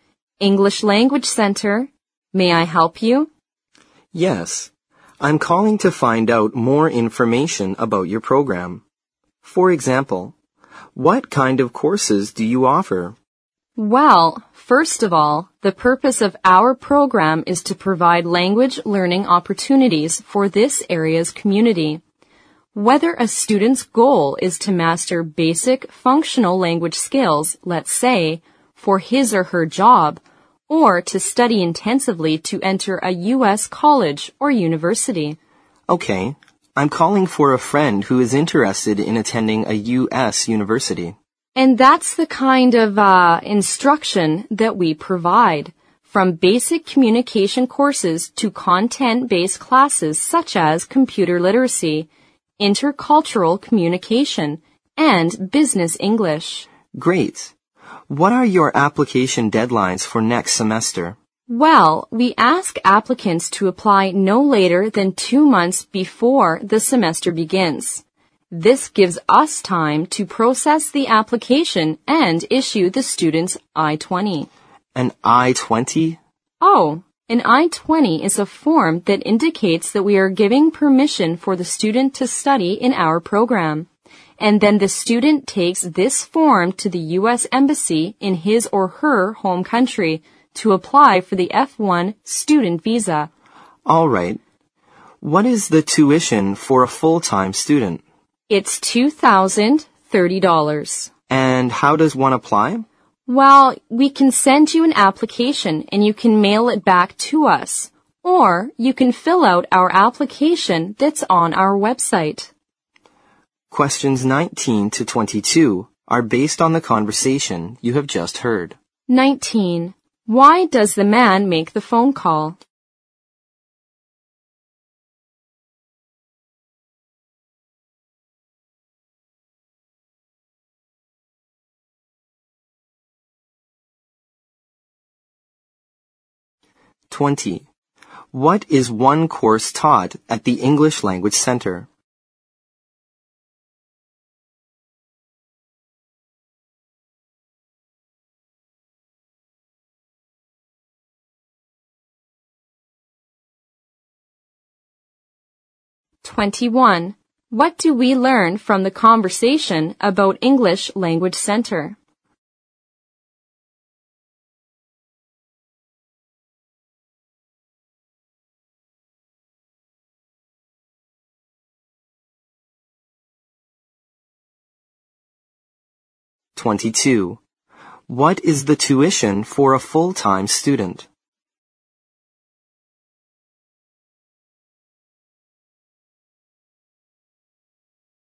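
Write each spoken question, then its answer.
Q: Why does the man make the phone call?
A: To get information about the program for a friend who wants to attend a U.S. university

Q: What is one course taught at the English Language Center?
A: Computer literacy (also intercultural communication or business English)

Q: What is the tuition for a full-time student?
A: $2,030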